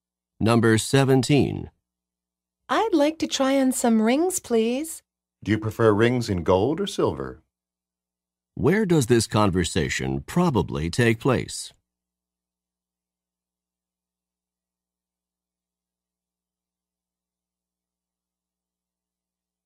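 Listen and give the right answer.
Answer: In a jewelry store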